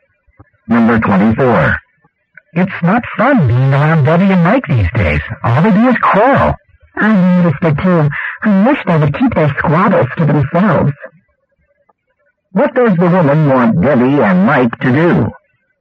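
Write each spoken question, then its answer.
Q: What does the woman want Debbie and Mike to do?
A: Keep their quarrels private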